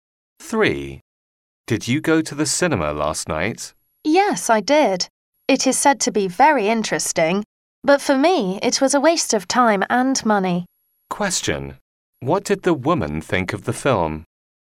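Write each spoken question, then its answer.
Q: What did the woman think of the film?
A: It was a waste of time and money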